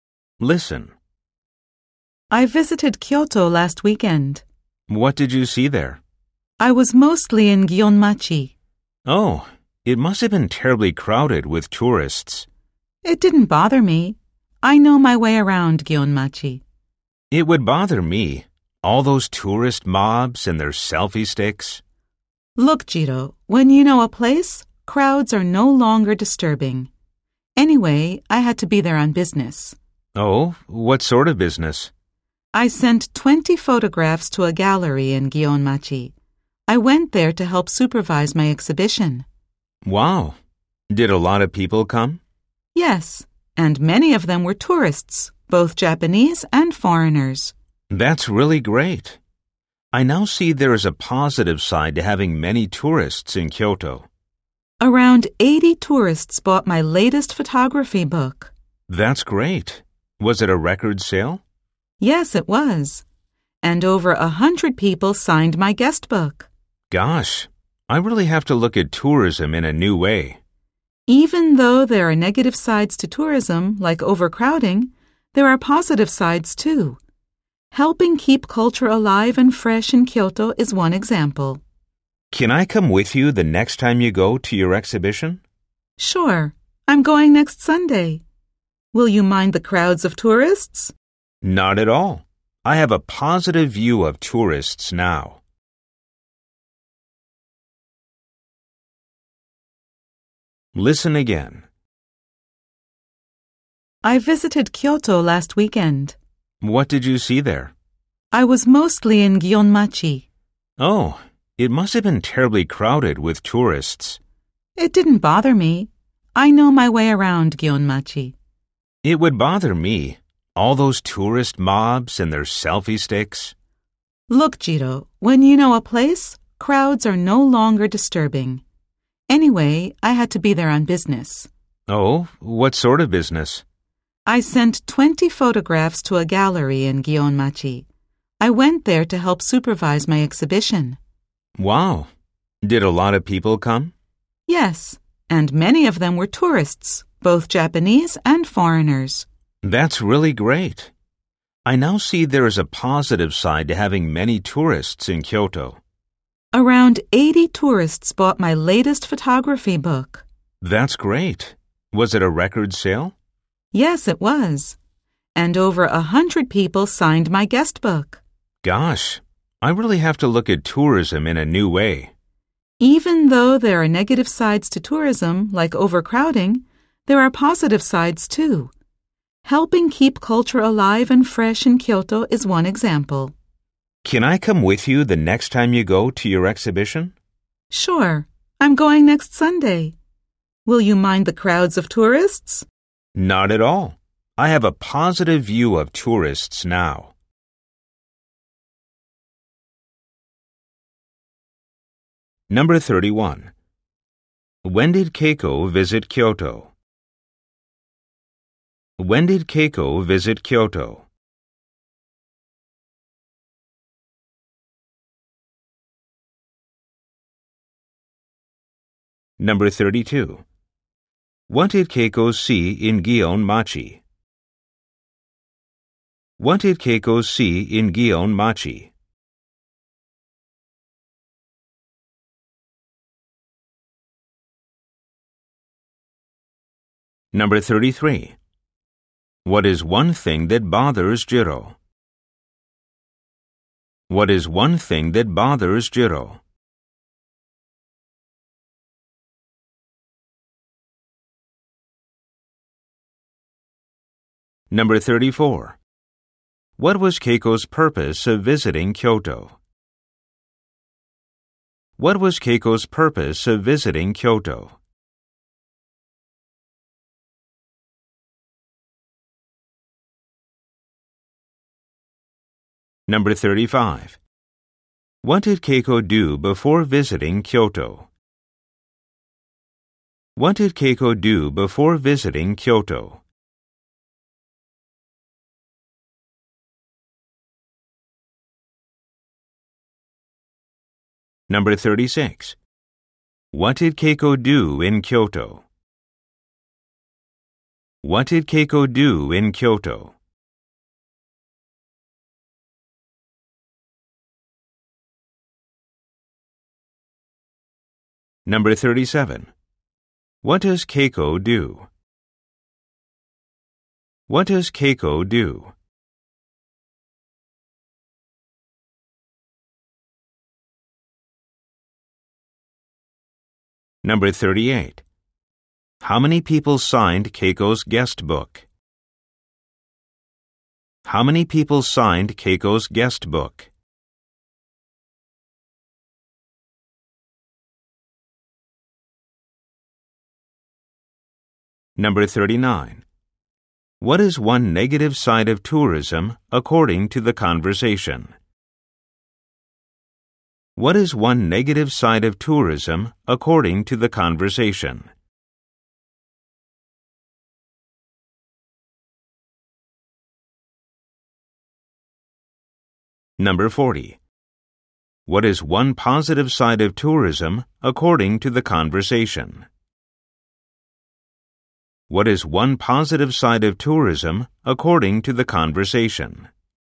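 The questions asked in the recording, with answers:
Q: When did Keiko visit Kyoto?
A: Last weekend

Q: What is one thing that bothers Jiro?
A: Tourist crowds with their selfie sticks

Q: What was Keiko's purpose of visiting Kyoto?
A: Business: to help supervise her exhibition

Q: What did Keiko do before visiting Kyoto?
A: She sent 20 photographs to a gallery in Gionmachi

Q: What did Keiko do in Kyoto?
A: She helped supervise her photo exhibition

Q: What does Keiko do?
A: She is a photographer

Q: How many people signed Keiko's guest book?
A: Over 100

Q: What is one negative side of tourism according to the conversation?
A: Overcrowding

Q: What is one positive side of tourism according to the conversation?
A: Helping keep culture alive and fresh in Kyoto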